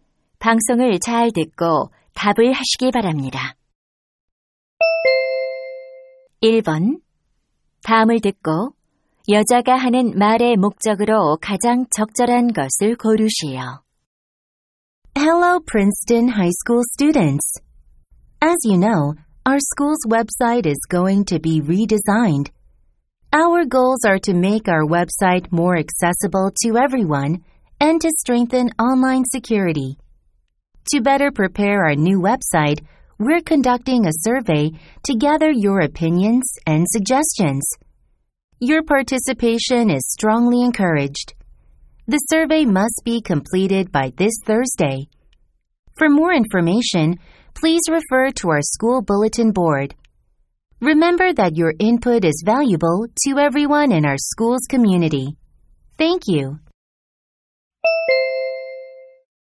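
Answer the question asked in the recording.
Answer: 학교 웹사이트 개편을 위한 설문 조사 참여를 독려하려고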